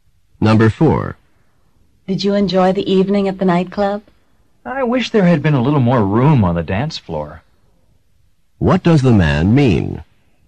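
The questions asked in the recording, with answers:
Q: What does the man mean?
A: The dance floor was too crowded.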